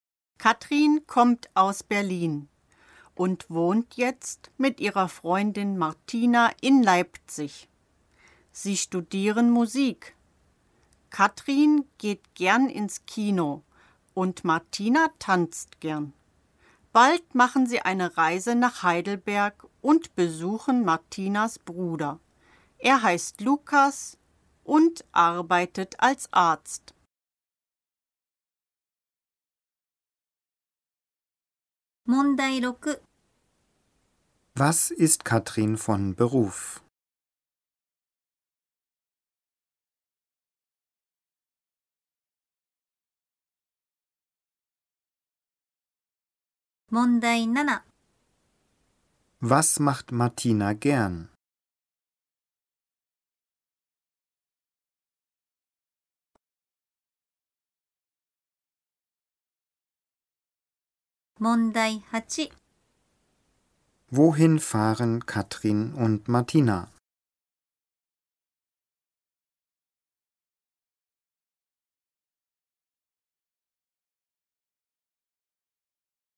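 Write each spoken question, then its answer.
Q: Was ist Katrin von Beruf?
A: Sie ist Studentin (sie studiert Musik).

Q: Was macht Martina gern?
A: Sie tanzt gern.

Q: Wohin fahren Katrin und Martina?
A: Nach Heidelberg.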